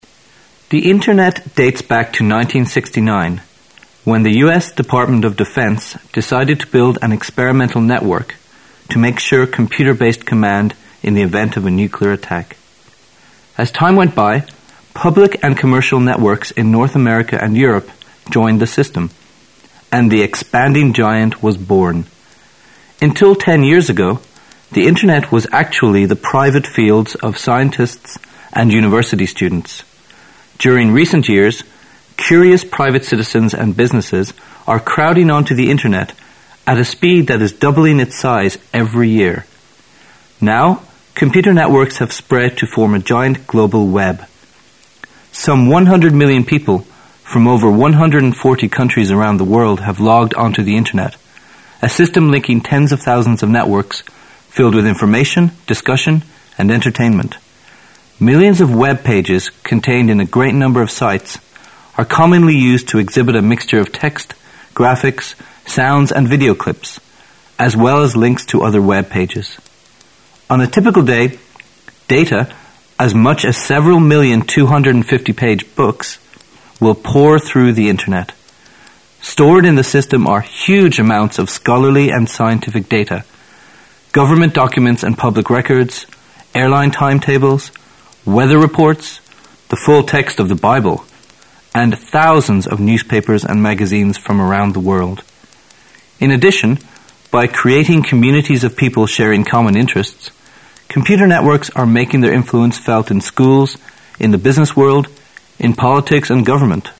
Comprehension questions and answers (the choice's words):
Questions 11 to 13 are based on the following passage. At the end of the passage, you will be given 15 seconds to answer the questions. Now listen to the passage.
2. If there were 100 million people logging on to the Internet in 1997, how many people logged on the Internet in 1995?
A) 10 million.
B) 25 million.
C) 50 million.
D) 75 million.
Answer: 25 million.

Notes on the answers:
本题通过数字计算间接测试对文中细节内容的理解能力。根据文中的直接信息"at a speed that is doubling its size every year",可知"人数每年增加一倍"。问题中假设 1997年的上网人数为1亿,问1995年为多少。简单计算一下就可得出正确答案为B。

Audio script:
[解析] 11-13 The Internet dates back to 1969, when the U.S. Department of Defense decided to build an experimental network to make sure computer-based command in the event of a nuclear attack. As time went by, public and commercial networks in North America and Europe joined the system, and the expanding giant was born. Until ten years ago, the Internet was actually the private fields of scientists and university students. During recent years, curious private citizens and businesses are crowding onto the Internet at a speed that is doubling its size every year. Now, computer networks have spread to form a giant global Web. Some 100 million people from over 140 countries around the world have logged on to the Internet, a system linking tens of thousands of networks filled with information, discussion and entertainment. Millions of Web pages contained in a great number of sites are commonly used to exhibit a mixture of text, graphics, sounds and video clips, as well as links to other Web pages. On a typical day, data, as much as several million 250-page books, will pour through the Internet. Stored in the system are huge amounts of scholarly and scientific data, government documents and public records, airline timetables, weather reports, the full text of the Bible, and thousands of newspapers and magazines from around the world. In addition, by creating communities of people sharing common interests, computer networks are making their influence felt in schools, in the business world, in politics and government.